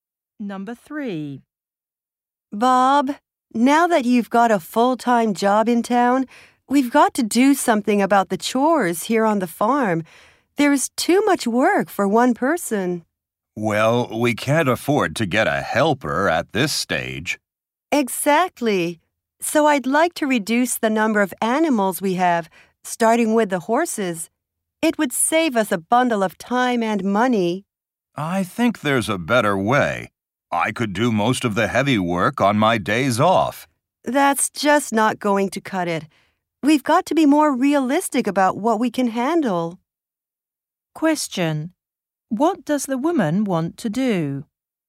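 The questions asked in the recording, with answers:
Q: What does the woman want to do?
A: Reduce the number of animals on the farm, starting with the horses.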